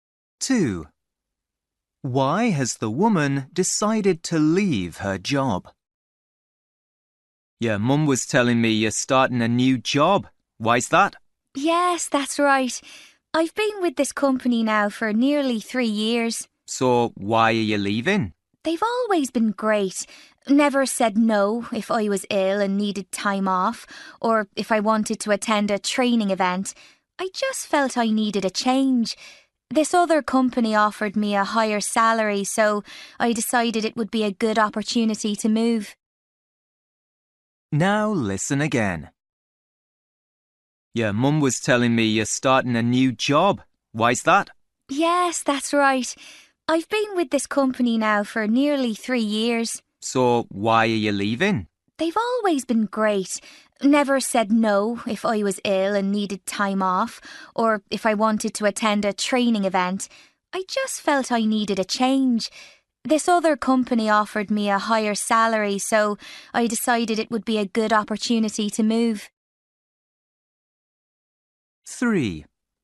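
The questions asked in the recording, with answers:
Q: Why has the woman decided to leave her job?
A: Another company offered her a higher salary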